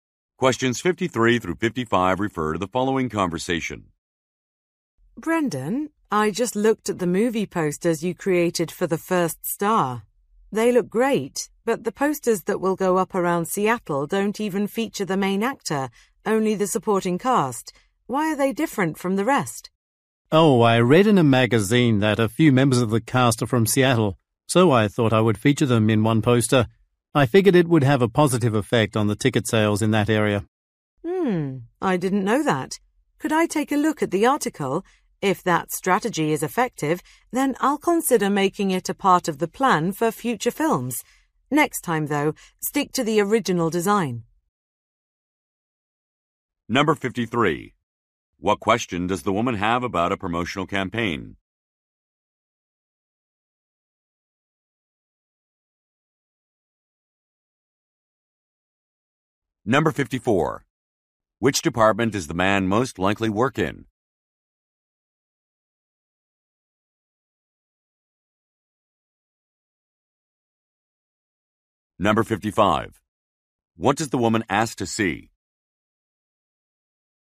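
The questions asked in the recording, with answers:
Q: What question does the woman have about a promotional campaign?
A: Why the Seattle posters are different from the rest

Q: What does the woman ask to see?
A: The magazine article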